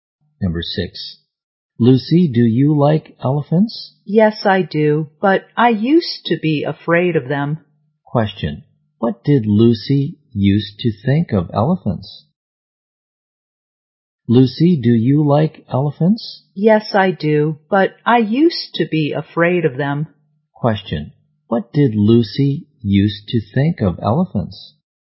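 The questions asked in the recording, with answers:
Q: what did Lucy used to think of elephants?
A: She was afraid of them.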